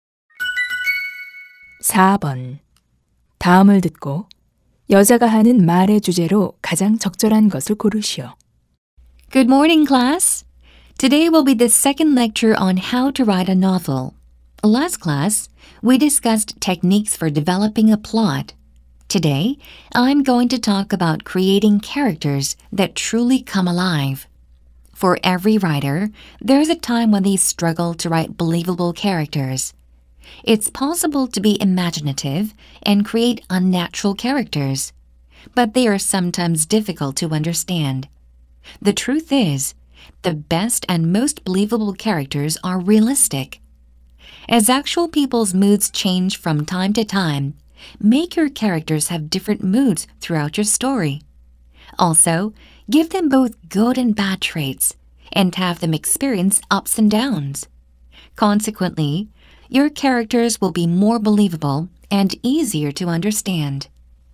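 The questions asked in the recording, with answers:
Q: 다음을 듣고 여자가 하는 말의 주제로 가장 적절한 것을 고르시오.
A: 소설에서 믿을 만한(사실적인) 인물을 만드는 방법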